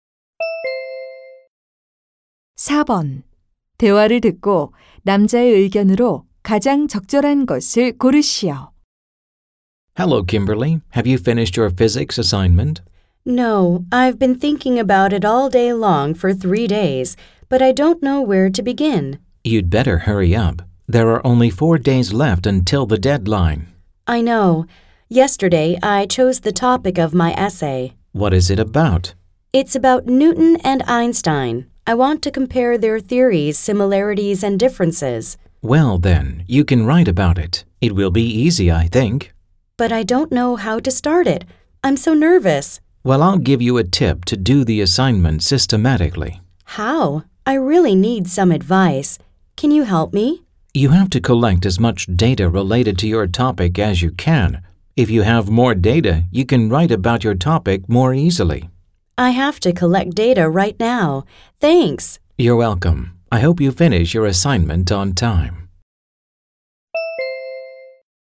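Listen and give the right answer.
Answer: 과제를 하려면 주제와 관련된 자료를 최대한 많이 모아야 한다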